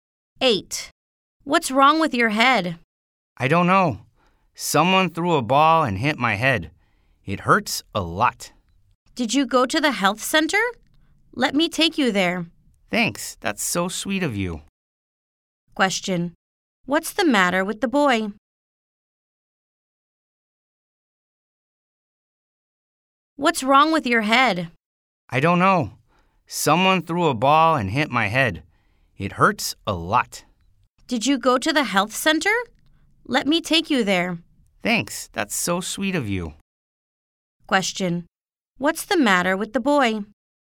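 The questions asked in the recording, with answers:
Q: What's the matter with the boy?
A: A ball hit his head and it hurts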